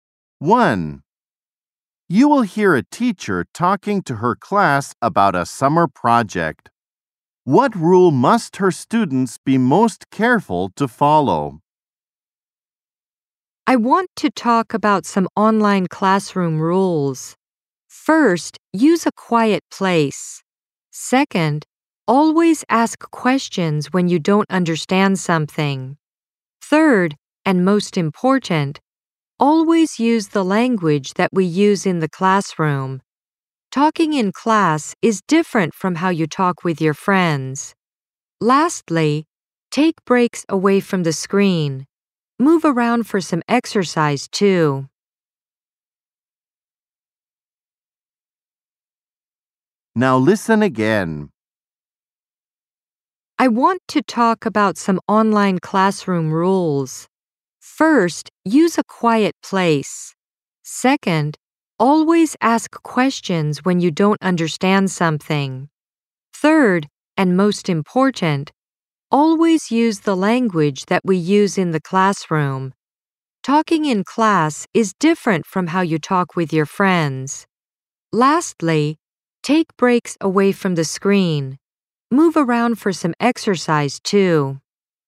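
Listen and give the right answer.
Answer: Always use the language used in the classroom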